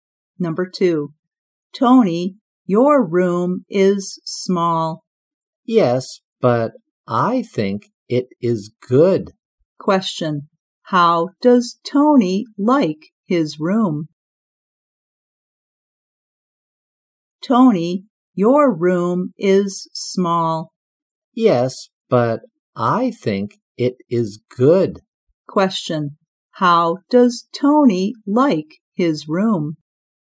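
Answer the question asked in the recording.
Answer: He thinks it is good.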